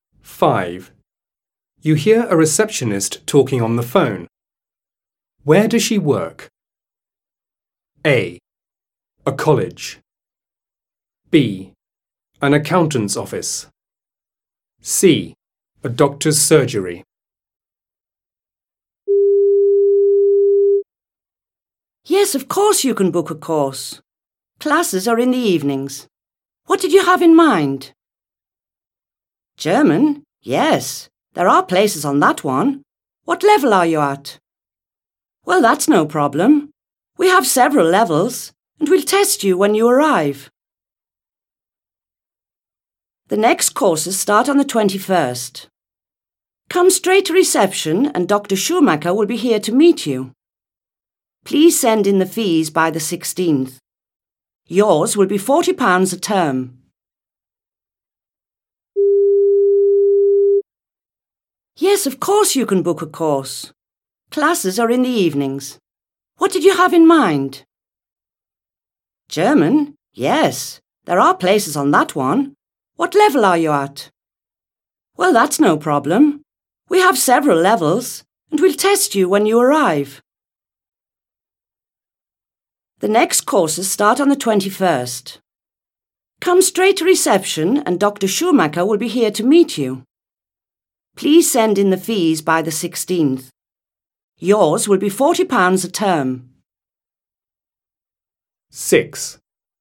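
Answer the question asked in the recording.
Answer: A: A college.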